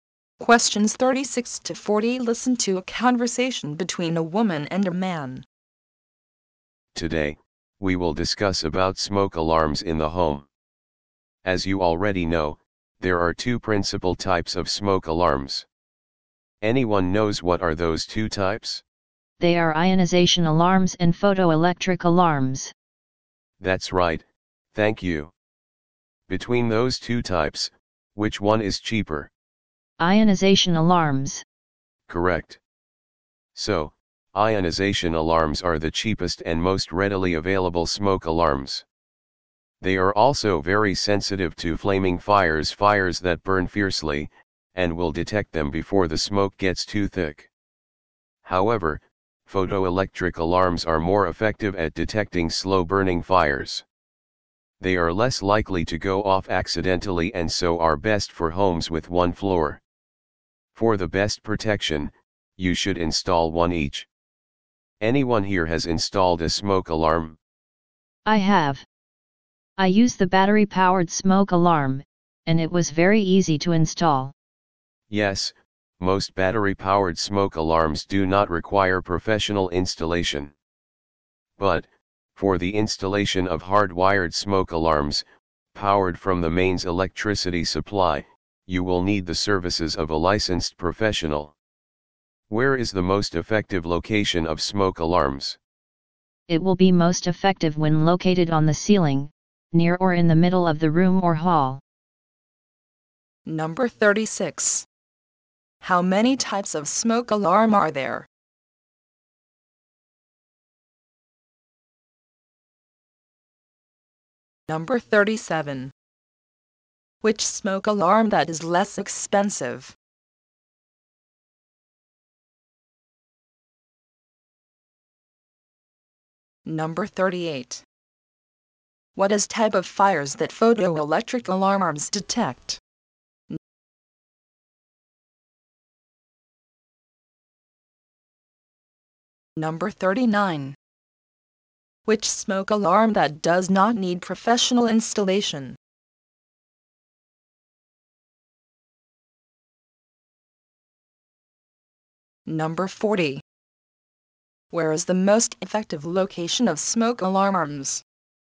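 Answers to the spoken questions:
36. Two
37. Ionization alarms
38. Slow-burning fires
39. Battery-powered smoke alarms
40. On the ceiling, near or in the middle of the room or hall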